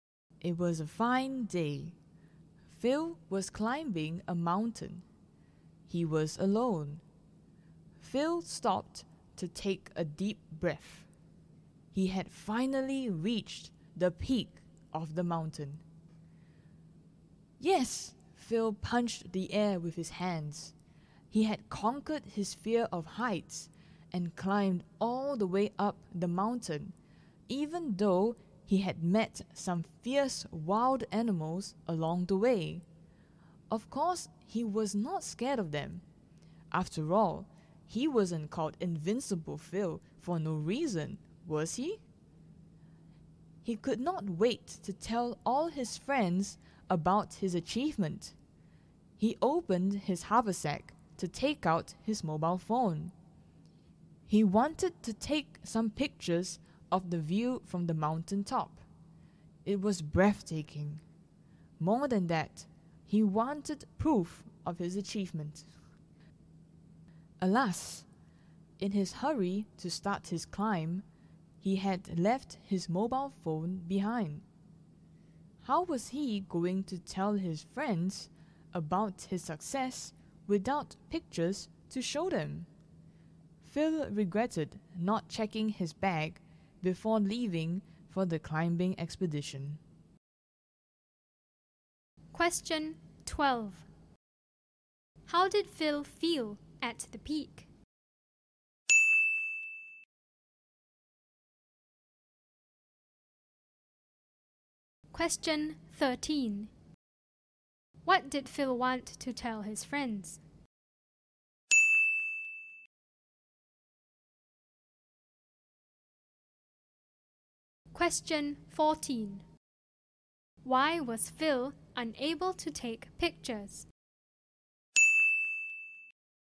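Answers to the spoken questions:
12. Proud and happy about his achievement
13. That he had climbed to the peak of the mountain (his achievement)
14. He had left his mobile phone behind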